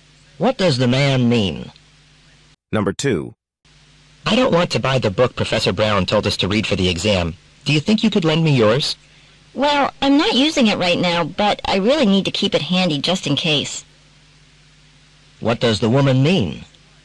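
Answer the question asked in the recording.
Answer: She would rather not lend her book because she needs to keep it handy.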